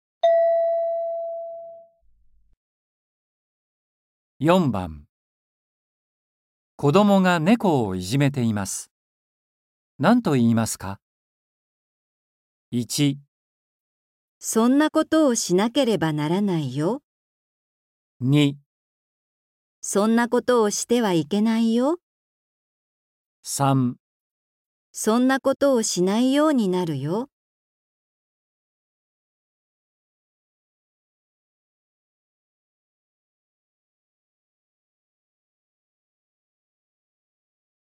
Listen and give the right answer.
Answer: 2

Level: 初級